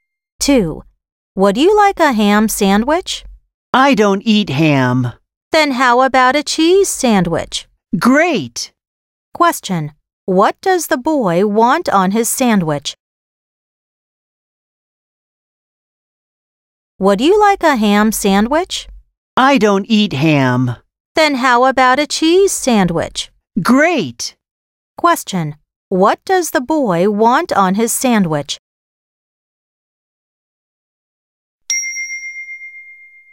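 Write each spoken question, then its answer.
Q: What does the boy want on his sandwich?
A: cheese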